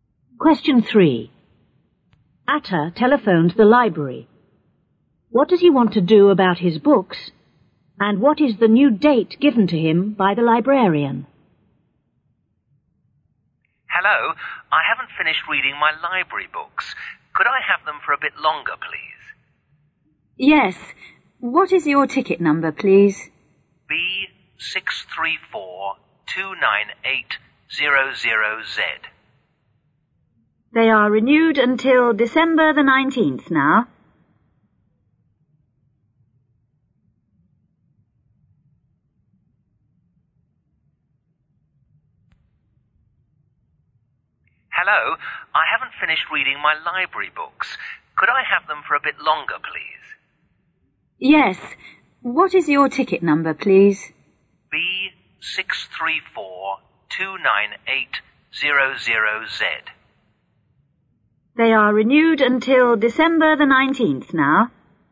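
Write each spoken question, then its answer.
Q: What does he want to do about his books?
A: Renew them (keep them longer)

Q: And what is the new date given to him by the librarian?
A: December the 19th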